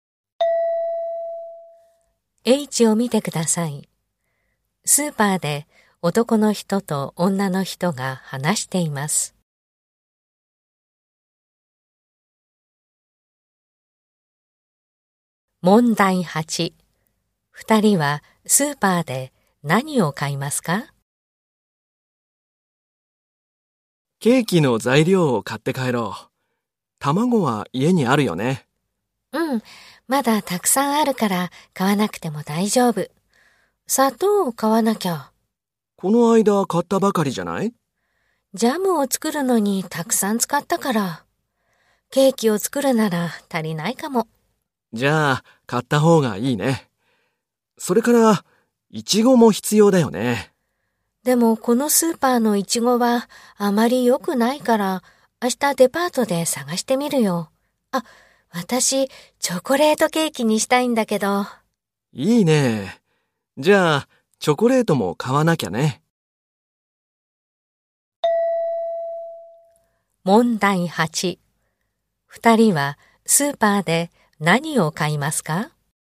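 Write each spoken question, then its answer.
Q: 二人はスーパーで何を買いますか?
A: 砂糖とチョコレート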